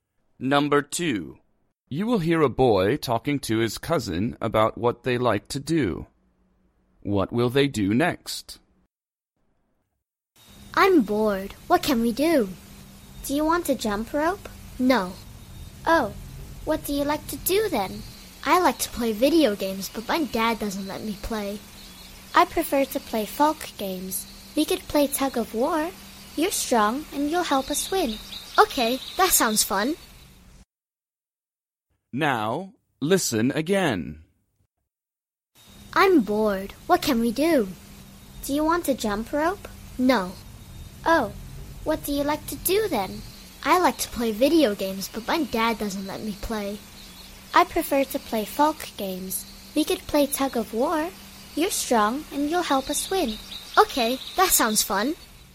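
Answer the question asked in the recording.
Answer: Play tug of war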